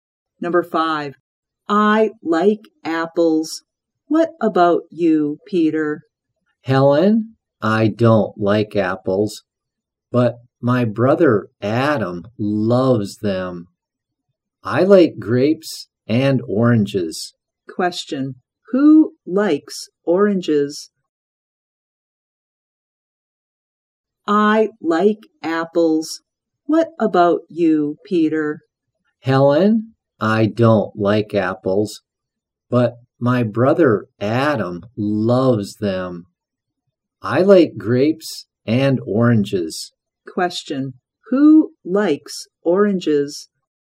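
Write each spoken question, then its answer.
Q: who likes oranges?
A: Peter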